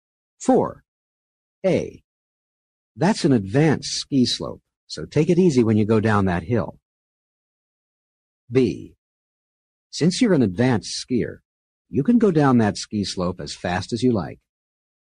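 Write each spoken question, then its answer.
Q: A. That's an advanced ski slope, so take it easy when you go down that hill.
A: different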